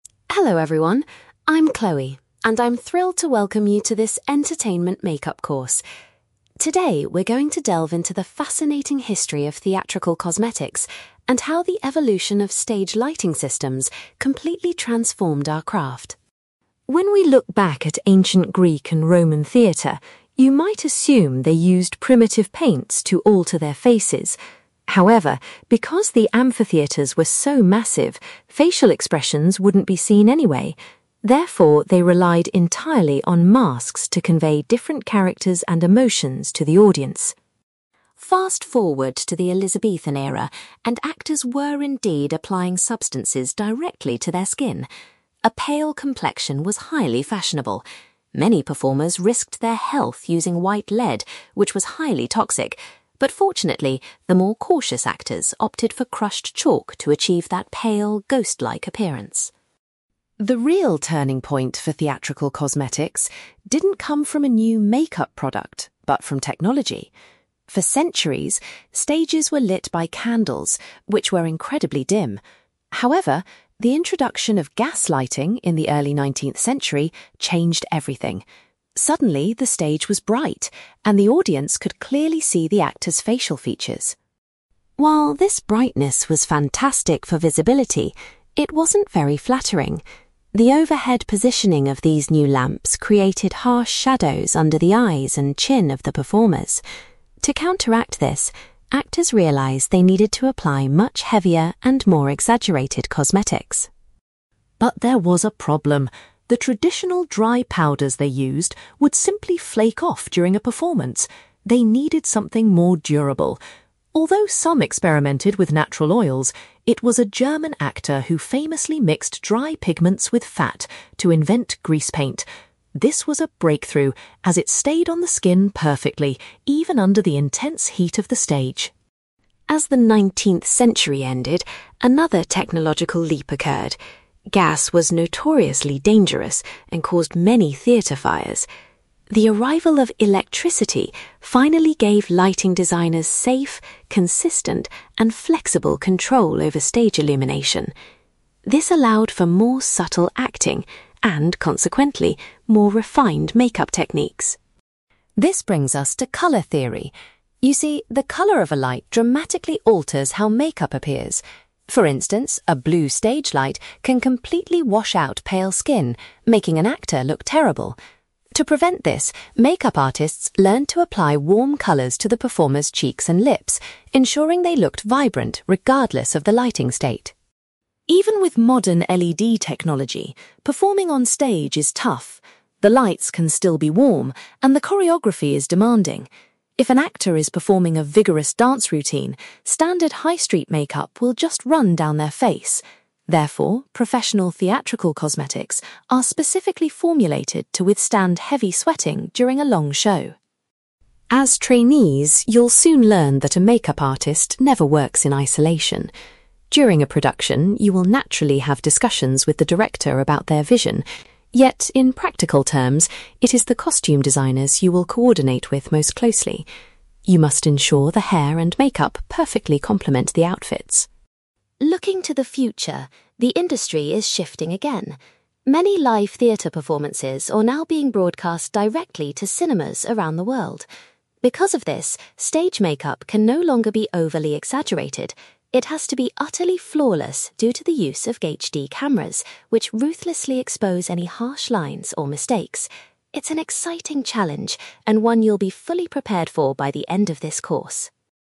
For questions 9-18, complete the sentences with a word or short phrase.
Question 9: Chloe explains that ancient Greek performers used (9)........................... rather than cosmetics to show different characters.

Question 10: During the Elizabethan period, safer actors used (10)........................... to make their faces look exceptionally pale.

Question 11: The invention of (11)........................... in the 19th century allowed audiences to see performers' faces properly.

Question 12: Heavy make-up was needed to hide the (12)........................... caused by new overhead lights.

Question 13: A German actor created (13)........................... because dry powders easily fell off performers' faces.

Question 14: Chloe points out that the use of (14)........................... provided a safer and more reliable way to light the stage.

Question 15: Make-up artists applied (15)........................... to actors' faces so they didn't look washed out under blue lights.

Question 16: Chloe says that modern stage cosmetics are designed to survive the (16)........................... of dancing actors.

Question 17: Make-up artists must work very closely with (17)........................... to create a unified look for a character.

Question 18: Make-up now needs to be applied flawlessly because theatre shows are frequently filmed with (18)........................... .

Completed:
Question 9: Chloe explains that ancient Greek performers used masks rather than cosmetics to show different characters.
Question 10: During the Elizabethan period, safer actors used chalk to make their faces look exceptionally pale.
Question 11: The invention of gas lighting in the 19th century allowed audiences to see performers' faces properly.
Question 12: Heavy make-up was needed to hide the shadows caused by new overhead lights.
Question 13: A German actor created greasepaint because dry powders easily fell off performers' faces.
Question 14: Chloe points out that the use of electricity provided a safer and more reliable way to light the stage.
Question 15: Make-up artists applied warm colours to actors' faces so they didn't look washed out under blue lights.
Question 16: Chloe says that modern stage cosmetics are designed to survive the heavy sweating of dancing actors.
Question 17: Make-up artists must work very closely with costume designers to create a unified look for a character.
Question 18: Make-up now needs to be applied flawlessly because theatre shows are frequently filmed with HD cameras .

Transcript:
Chloe: Hello everyone, I'm Chloe, and I'm thrilled to welcome you to this entertainment make-up course. Today, we're going to delve into the fascinating history of theatrical cosmetics and how the evolution of stage lighting systems completely transformed our craft.
When we look back at ancient Greek and Roman theatre, you might assume they used primitive paints to alter their faces. However, because the amphitheatres were so massive, facial expressions wouldn't be seen anyway. Therefore, they relied entirely on masks to convey different characters and emotions to the audience.
Fast forward to the Elizabethan era, and actors were indeed applying substances directly to their skin. A pale complexion was highly fashionable. Many performers risked their health using white lead, which was highly toxic, but fortunately, the more cautious actors opted for crushed chalk to achieve that pale, ghost-like appearance.
The real turning point for theatrical cosmetics didn't come from a new make-up product, but from technology. For centuries, stages were lit by candles, which were incredibly dim. However, the introduction of gas lighting in the early nineteenth century changed everything. Suddenly, the stage was bright, and the audience could clearly see the actors' facial features.
While this brightness was fantastic for visibility, it wasn't very flattering. The overhead positioning of these new lamps created harsh shadows under the eyes and chin of the performers. To counteract this, actors realised they needed to apply much heavier and more exaggerated cosmetics.
But there was a problem. The traditional dry powders they used would simply flake off during a performance. They needed something more durable. Although some experimented with natural oils, it was a German actor who famously mixed dry pigments with fat to invent greasepaint. This was a breakthrough, as it stayed on the skin perfectly, even under the intense heat of the stage.
As the nineteenth century ended, another technological leap occurred. Gas was notoriously dangerous and caused many theatre fires. The arrival of electricity finally gave lighting designers safe, consistent, and flexible control over stage illumination. This allowed for more subtle acting and, consequently, more refined make-up techniques.
This brings us to colour theory. You see, the colour of a light dramatically alters how make-up appears. For instance, a blue stage light can completely wash out pale skin, making an actor look terrible. To prevent this, make-up artists learned to apply warm colours to the performers' cheeks and lips, ensuring they looked vibrant regardless of the lighting state.
Even with modern LED technology, performing on stage is tough. The lights can still be warm, and the choreography is demanding. If an actor is performing a vigorous dance routine, standard high-street make-up will just run down their face. Therefore, professional theatrical cosmetics are specifically formulated to withstand heavy sweating during a long show.
As trainees, you'll soon learn that a make-up artist never works in isolation. During a production, you will naturally have discussions with the director about their vision. Yet, in practical terms, it is the costume designers you will coordinate with most closely. You must ensure the hair and make-up perfectly complement the outfits.
Looking to the future, the industry is shifting again. Many live theatre performances are now being broadcast directly to cinemas around the world. Because of this, stage make-up can no longer be overly exaggerated. It has to be utterly flawless due to the use of HD cameras, which ruthlessly expose any harsh lines or mistakes. It's an exciting challenge, and one you'll be fully prepared for by the end of this course!

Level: B2